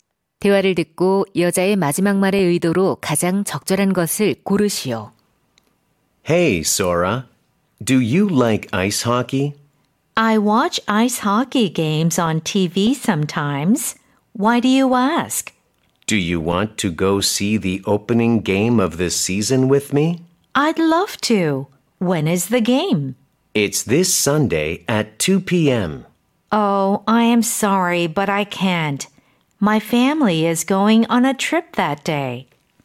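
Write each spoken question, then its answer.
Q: 대화를 듣고 여자의 마지막 말의 의도로 가장 적절한 것을 고르시오.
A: 거절 (초대를 거절함)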